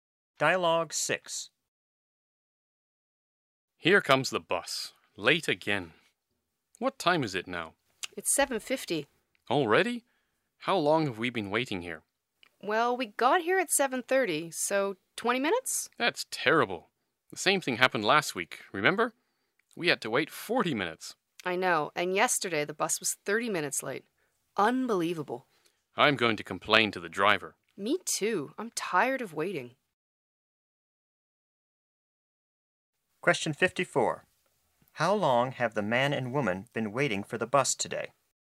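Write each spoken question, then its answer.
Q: How long have the man and woman been waiting for the bus today?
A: 20 minutes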